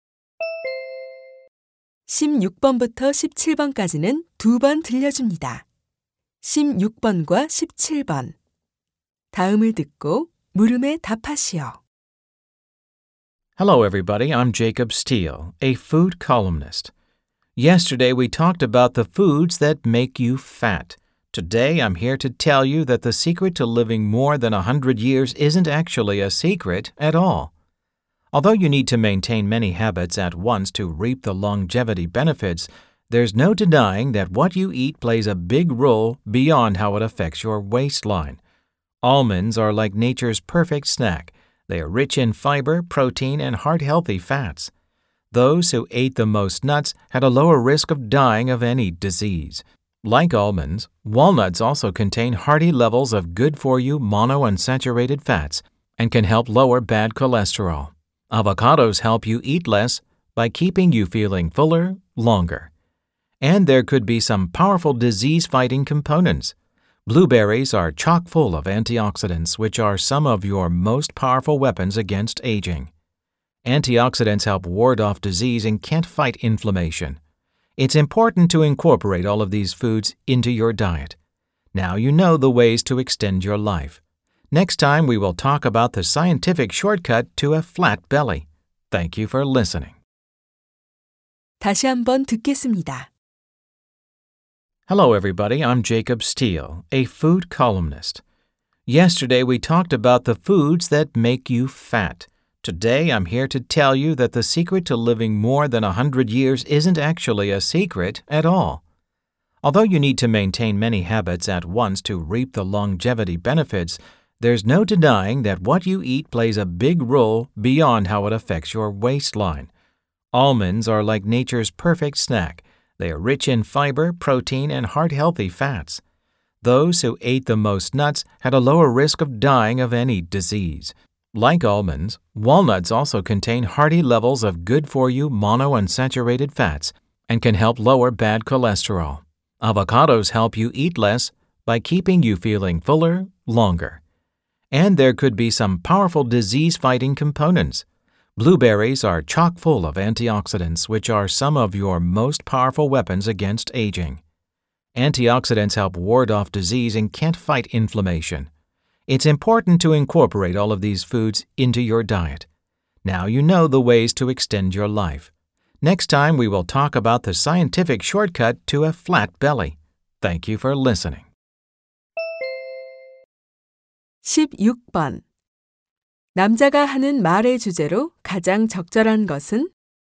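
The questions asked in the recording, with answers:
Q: 남자가 하는 말의 주제로 가장 적절한 것은?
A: 장수에 도움이 되는 음식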